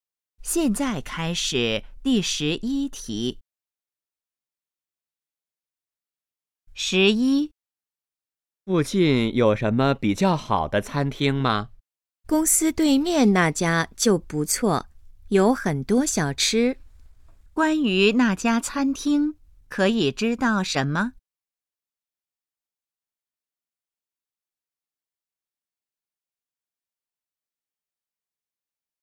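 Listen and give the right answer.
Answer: 在公司对面,有很多小吃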